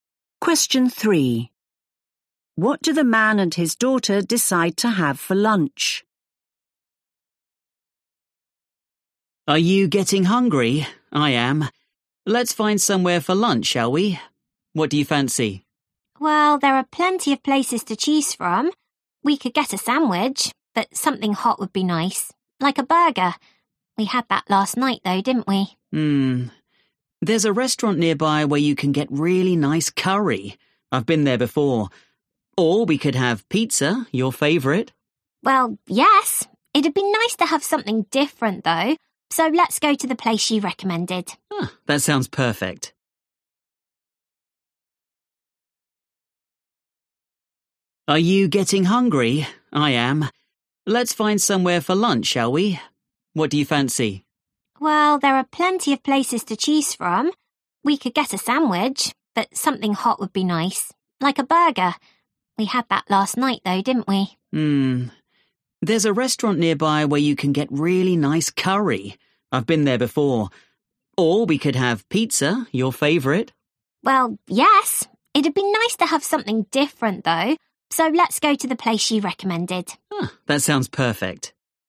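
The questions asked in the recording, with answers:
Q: What do the man and his daughter decide to have for lunch?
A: curry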